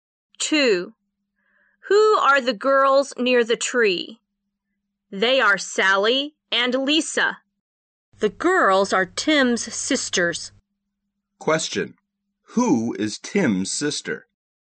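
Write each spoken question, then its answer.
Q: Who is Tim's sister?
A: Sally and Lisa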